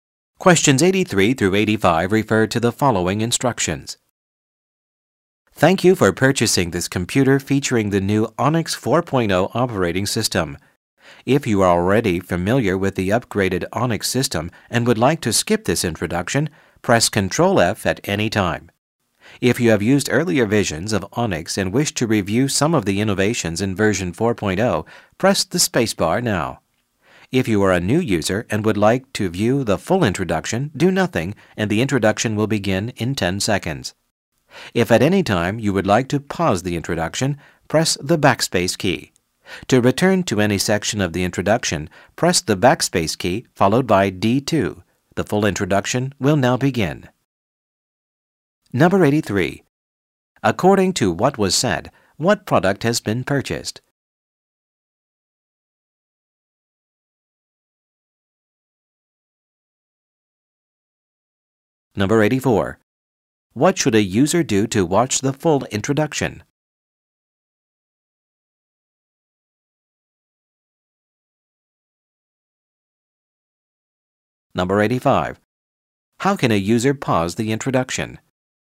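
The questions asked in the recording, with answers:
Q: According to what was said, what product has been purchased?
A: A computer

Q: What should a user do to watch the full introduction?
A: Do nothing

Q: How can a user pause the introduction?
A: Press the backspace key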